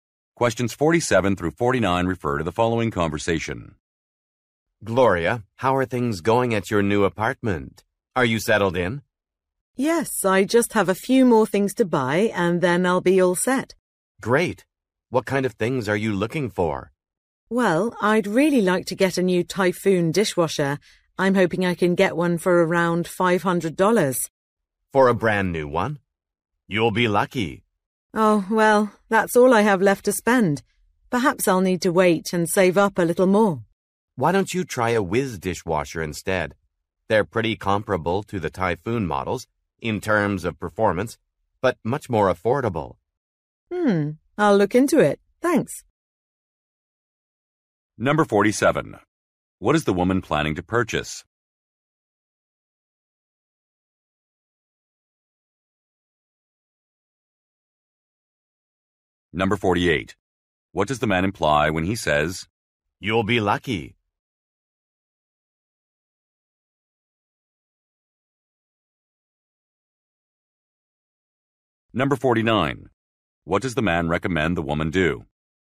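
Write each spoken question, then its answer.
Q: What is the woman planning to purchase?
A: A dishwasher

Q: What does the man imply when he says,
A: A new one probably costs more than $500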